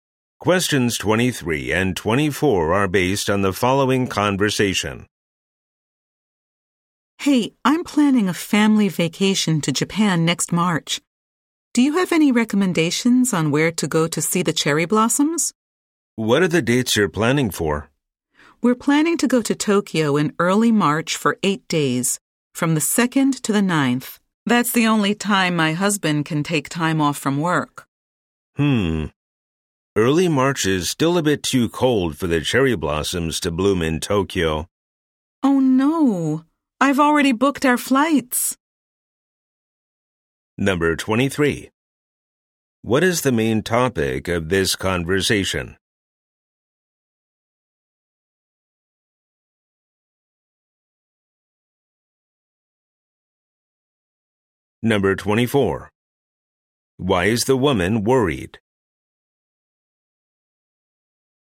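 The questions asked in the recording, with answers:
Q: What is the main topic of this conversation?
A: Seeing cherry blossoms on a trip to Japan

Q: Why is the woman worried?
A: The cherry blossoms may not bloom during her trip, and she has already booked flights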